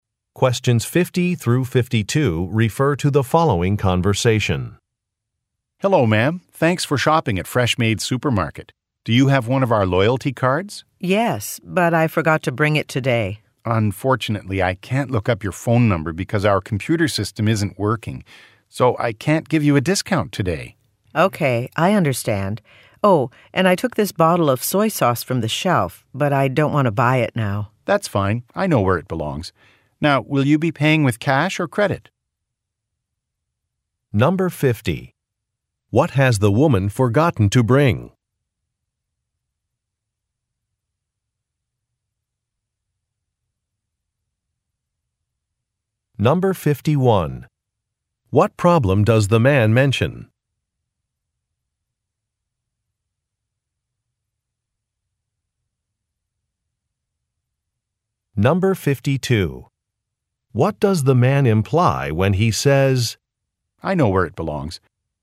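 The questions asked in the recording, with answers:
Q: What has the woman forgotten to bring?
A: Her loyalty card

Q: What problem does the man mention?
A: The computer system isn't working

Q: What does the man imply when he says,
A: He will return the soy sauce to the shelf himself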